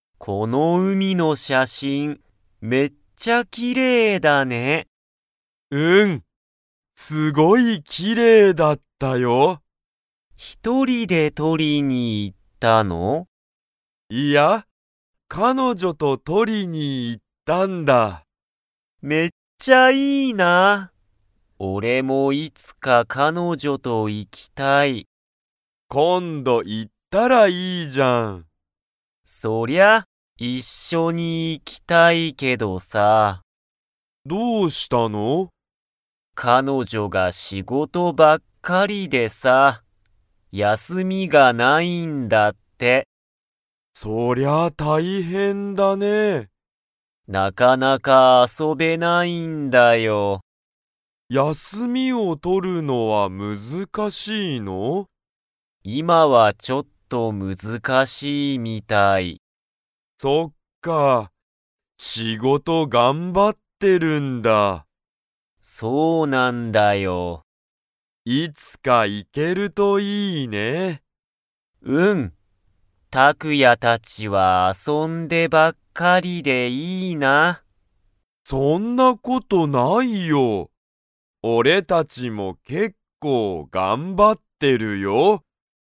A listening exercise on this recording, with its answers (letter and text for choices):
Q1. タクヤは、ひとりで写真(しゃしん)を撮(と)りに行(い)きましたか?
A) はい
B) いいえ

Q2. ハヤトの彼女(かのじょ)は、____がない。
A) 休(やす)み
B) 仕事(しごと)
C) 写真(しゃしん)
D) 海(うみ)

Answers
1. B) いいえ
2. A) 休(やす)み

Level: Level 2